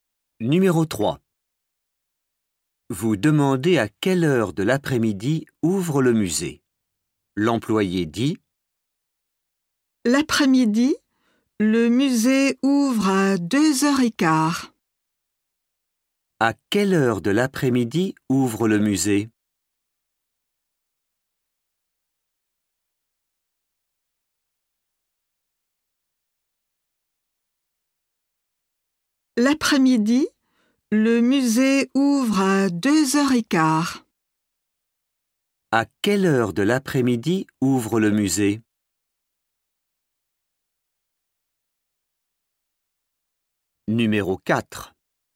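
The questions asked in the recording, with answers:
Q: À quelle heure de l'après-midi ouvre le musée?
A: à 2h15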